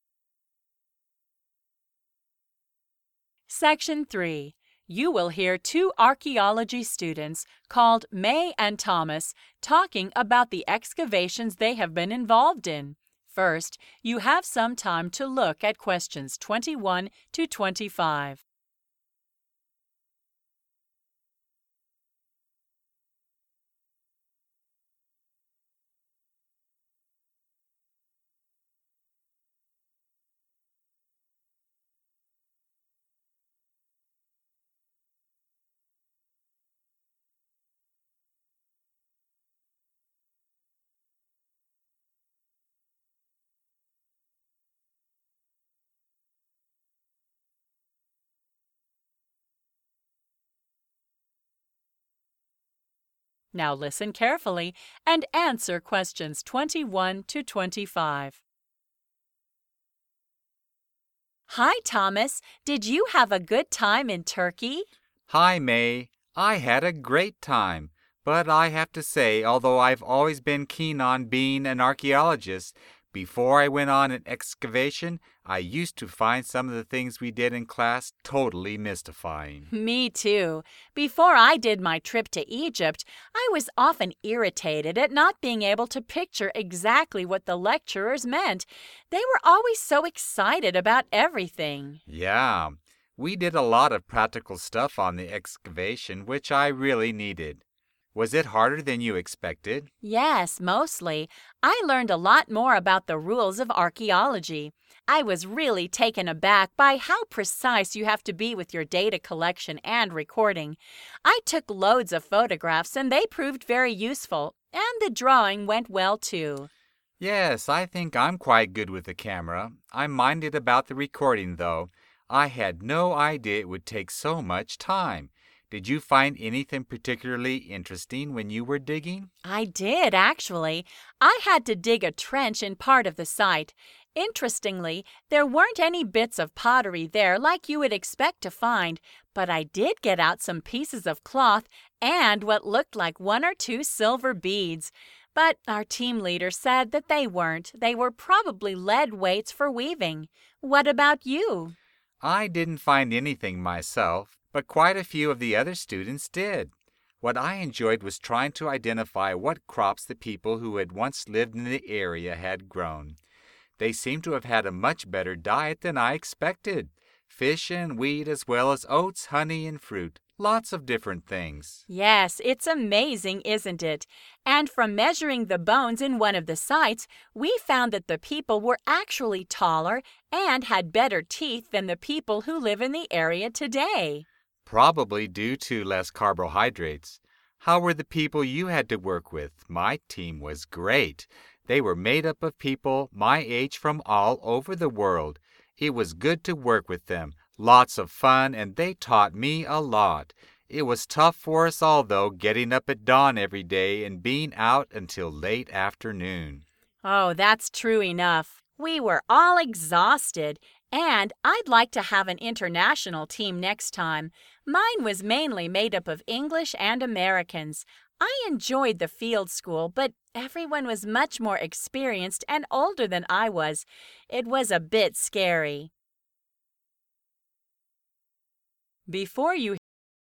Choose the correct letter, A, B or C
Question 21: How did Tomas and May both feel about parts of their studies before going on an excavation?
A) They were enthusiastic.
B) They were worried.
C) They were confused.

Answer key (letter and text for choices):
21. C) They were confused.